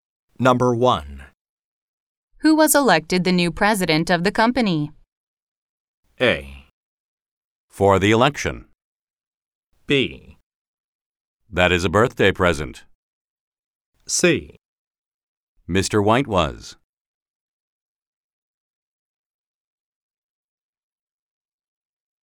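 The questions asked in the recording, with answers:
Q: Who was elected the new president of the company?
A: C: Mr. White was.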